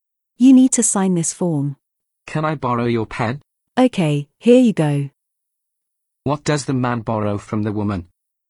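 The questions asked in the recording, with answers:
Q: What does the man borrow from the woman?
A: A pen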